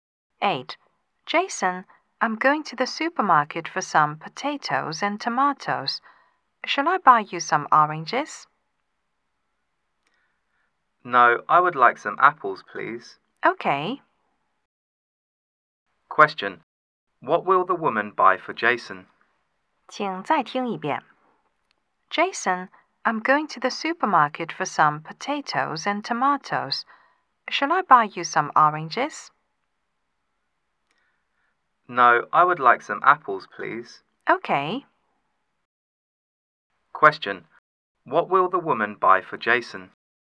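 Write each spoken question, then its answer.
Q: What will the woman buy for Jason?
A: Some apples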